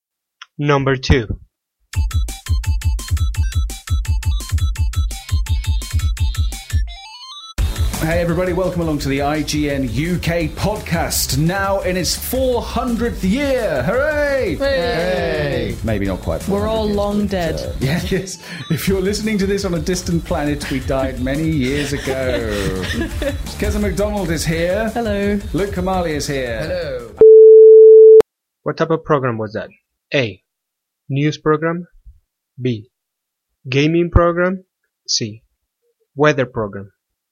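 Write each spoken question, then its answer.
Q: What type of program was that?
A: B: Gaming program.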